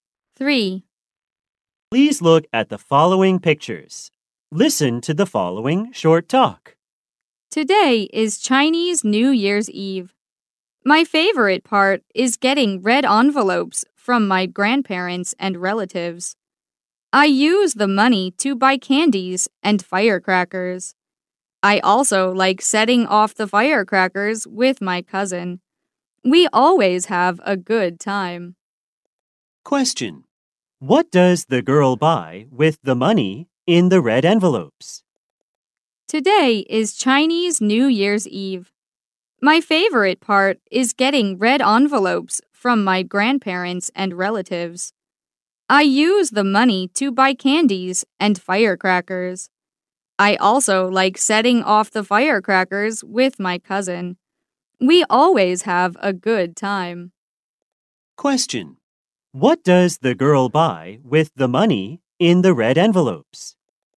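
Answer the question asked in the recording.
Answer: Candies and firecrackers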